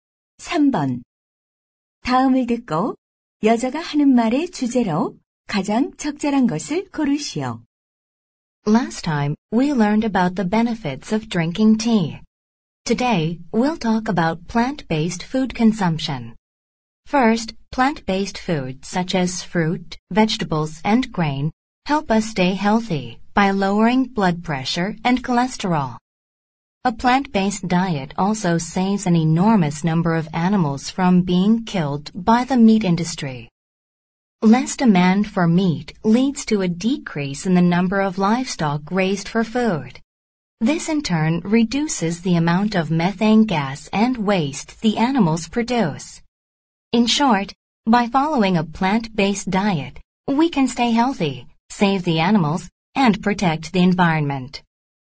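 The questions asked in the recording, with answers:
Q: 다음을 듣고 여자가 하는 말의 주제로 가장 적절한 것을 고르시오.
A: 식물성 식단의 이점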